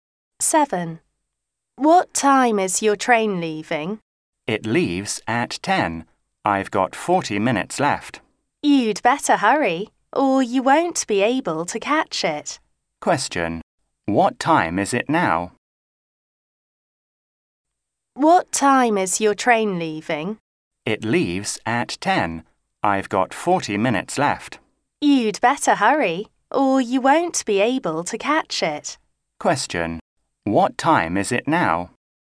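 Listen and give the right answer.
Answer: 9:20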